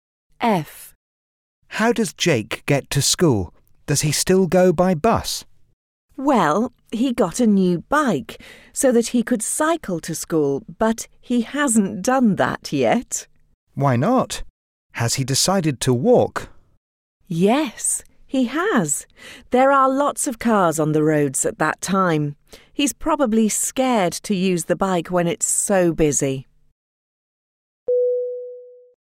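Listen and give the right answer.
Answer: He walks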